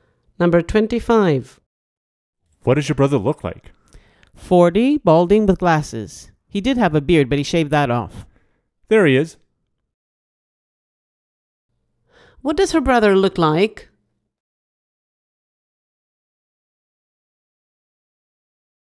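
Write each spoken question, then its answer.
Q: What does her brother look like?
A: 40, balding, with glasses, no beard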